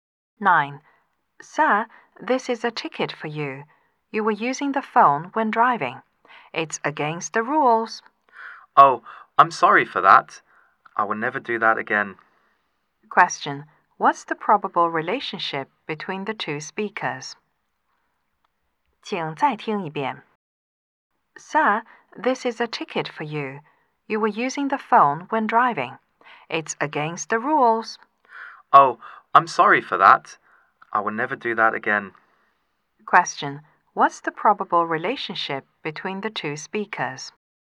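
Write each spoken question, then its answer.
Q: What's the probable relationship between the two speakers?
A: Policeman and driver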